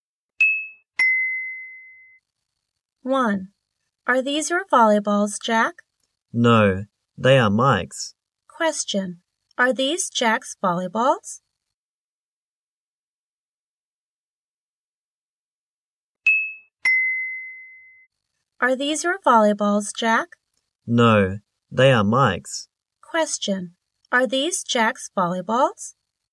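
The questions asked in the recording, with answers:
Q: Are these Jack's volleyballs?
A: No, they are Mike's.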